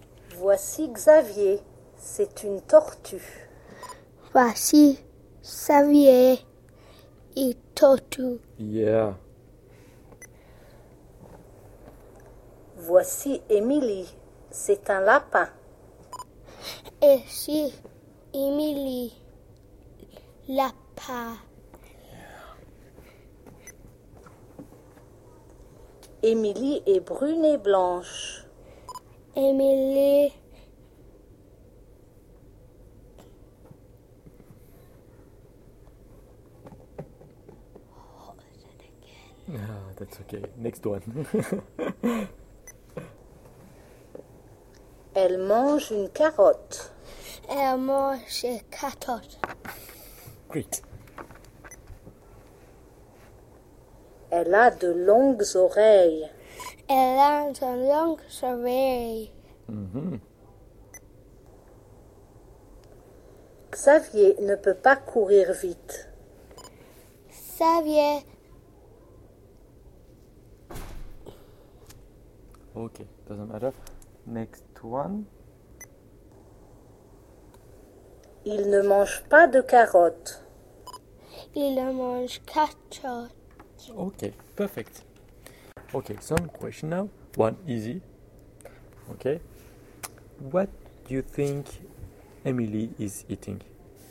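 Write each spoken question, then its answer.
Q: What do you think Emily is eating?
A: A carrot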